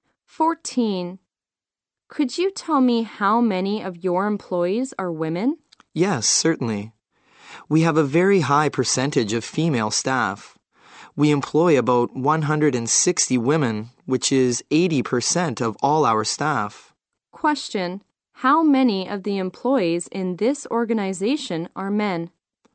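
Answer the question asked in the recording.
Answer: About 40.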